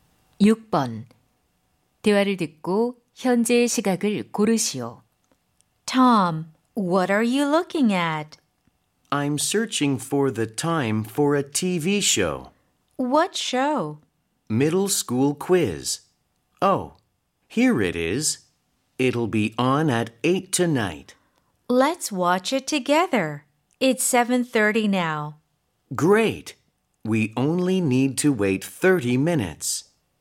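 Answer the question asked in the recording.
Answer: 7시 30분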